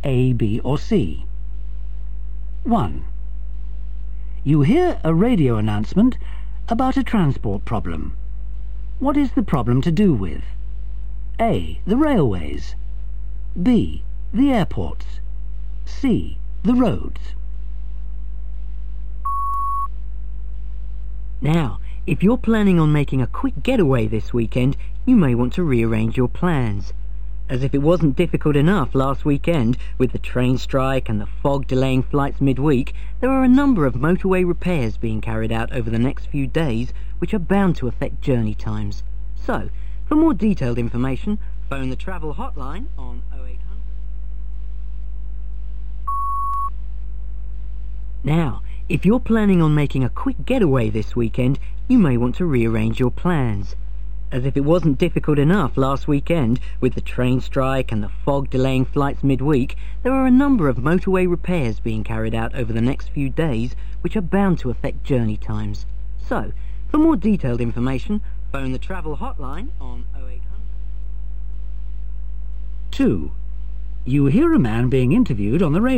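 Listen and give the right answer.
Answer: C: The roads.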